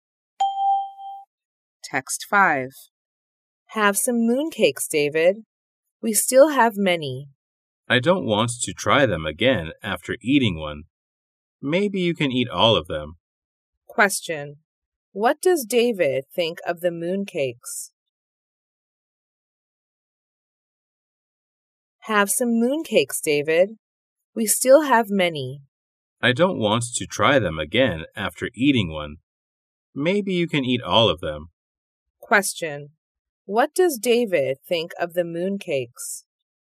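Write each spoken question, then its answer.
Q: What does David think of the mooncakes?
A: He doesn't like them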